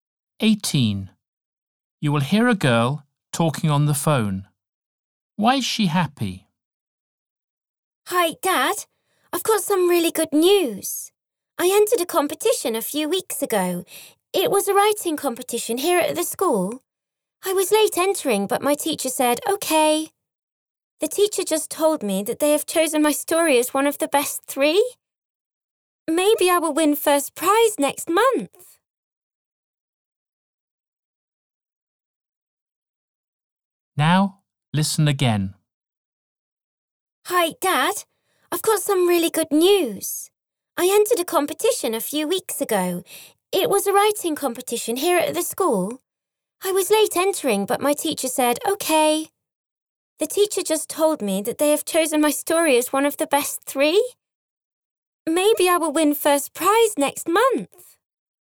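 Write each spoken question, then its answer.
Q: Why is she happy?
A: Her story was chosen as one of the best three in a writing competition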